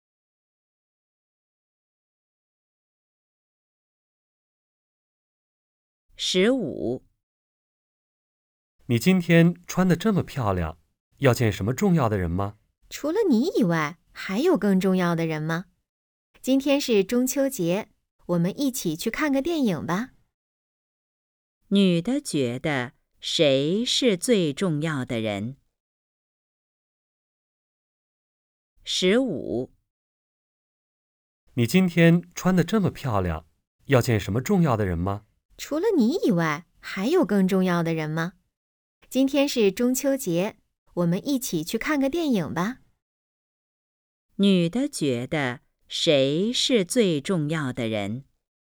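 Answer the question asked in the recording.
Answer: 男的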